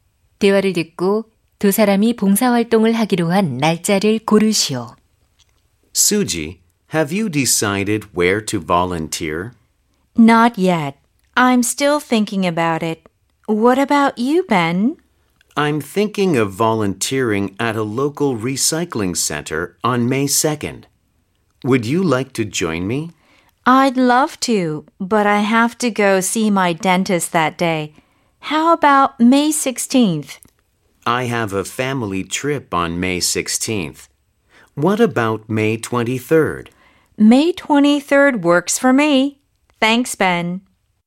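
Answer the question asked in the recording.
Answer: 5월 23일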